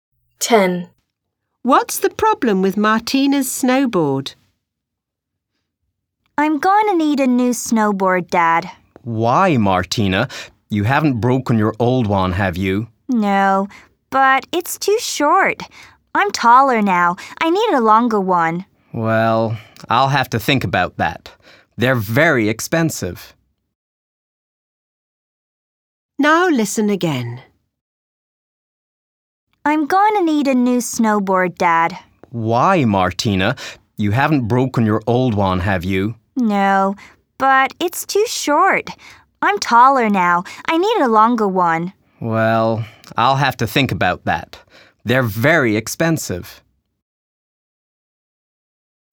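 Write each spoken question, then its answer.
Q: What's the problem with Martina's snowboard?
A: It's too short.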